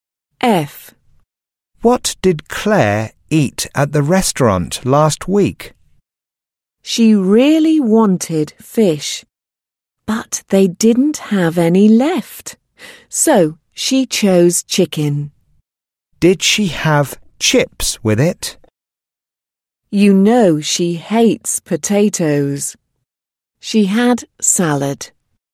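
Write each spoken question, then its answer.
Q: What did Claire eat at the restaurant last week?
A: Chicken with salad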